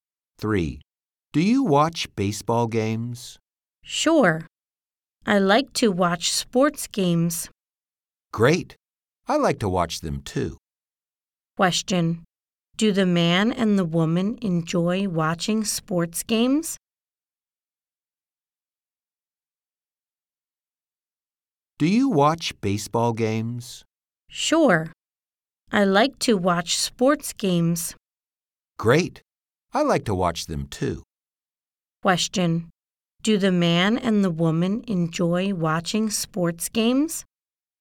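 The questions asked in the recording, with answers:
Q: Do the man and the woman enjoy watching sports games?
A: Yes, they do.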